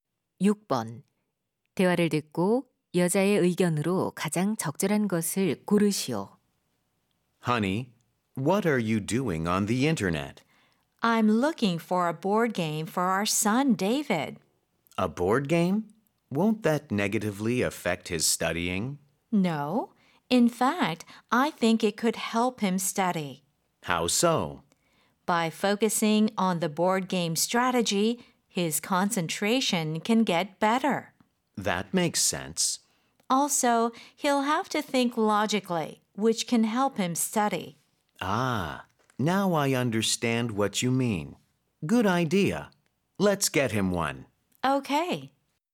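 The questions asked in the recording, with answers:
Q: 대화를 듣고 여자의 의견으로 가장 적절한 것을 고르시오.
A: 보드게임은 아이의 공부에 도움이 될 수 있다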